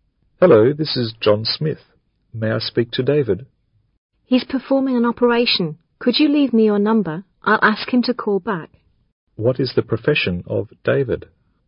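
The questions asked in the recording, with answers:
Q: What is the profession of David?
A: A doctor (surgeon)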